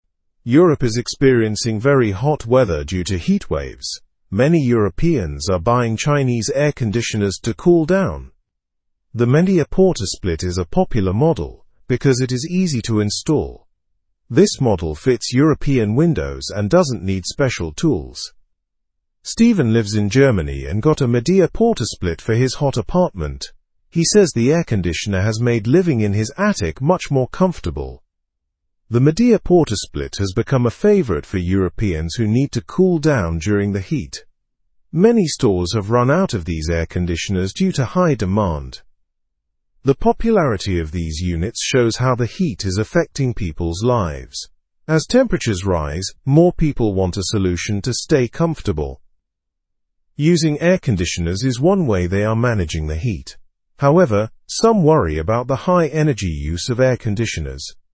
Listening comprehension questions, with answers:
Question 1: What kind of weather is Europe experiencing?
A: Very hot weather due to heatwaves.

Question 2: Which air-conditioner model is popular in Europe?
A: The Midea PortaSplit.

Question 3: Why is the Midea PortaSplit model favored?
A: Because it is easy to install.

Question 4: Where does Steven live?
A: Steven lives in Germany.

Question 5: How has the Midea PortaSplit helped Steven?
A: It has made his attic more comfortable.

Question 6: What problem are stores facing with air-conditioners?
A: Many stores have run out of these air-conditioners.

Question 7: What concern do people have regarding air-conditioners?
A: People worry about the high energy use.

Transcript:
Europe is experiencing very hot weather due to heatwaves. Many Europeans are buying Chinese air-conditioners to cool down. The Midea PortaSplit is a popular model because it is easy to install. This model fits European windows and doesn't need special tools.
Steven lives in Germany and got a Midea PortaSplit for his hot apartment. He says the air-conditioner has made living in his attic much more comfortable. The Midea PortaSplit has become a favorite for Europeans who need to cool down during the heat. Many stores have run out of these air-conditioners due to high demand.
The popularity of these units shows how the heat is affecting people's lives. As temperatures rise, more people want a solution to stay comfortable. Using air-conditioners is one way they are managing the heat. However, some worry about the high energy use of air-conditioners.

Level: Level 2